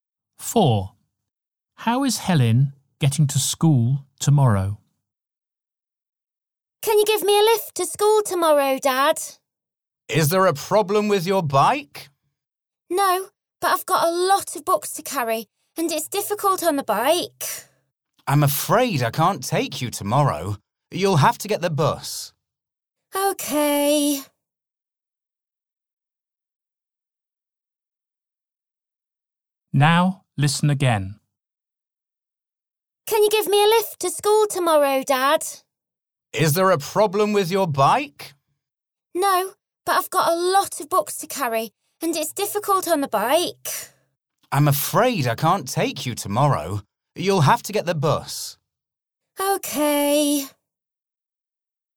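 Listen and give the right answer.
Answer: By bus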